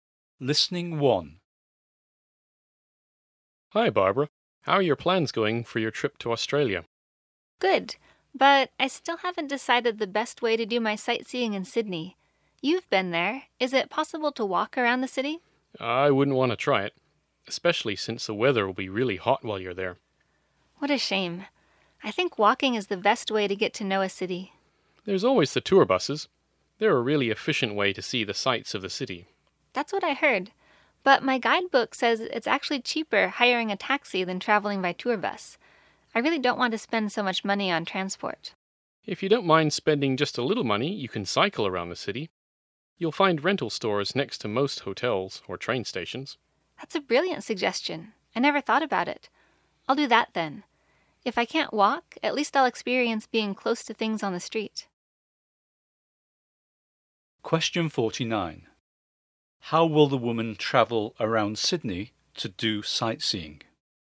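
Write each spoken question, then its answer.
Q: How will the woman travel around Sydney to do sightseeing?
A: By bicycle (cycling)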